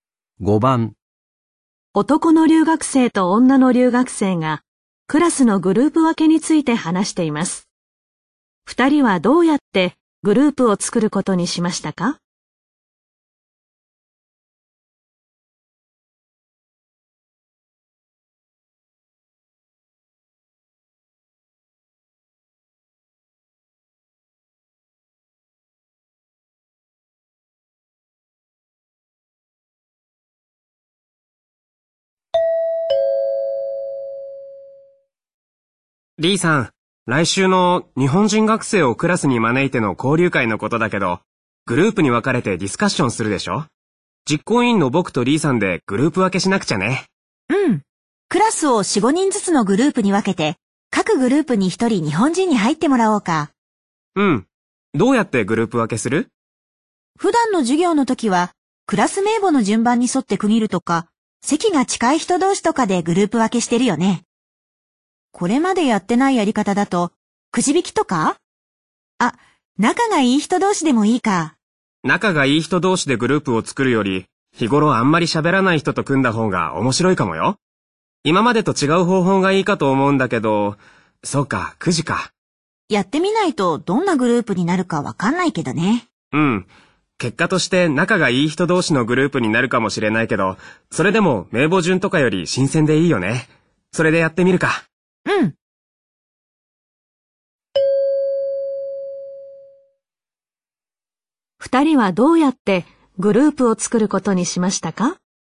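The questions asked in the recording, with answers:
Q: 二人はどうやってグループを作ることにしましたか?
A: くじ引きで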